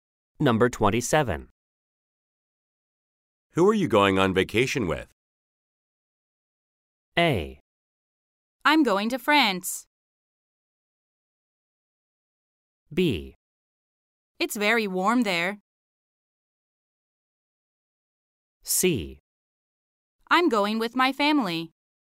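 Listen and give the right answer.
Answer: C: I'm going with my family.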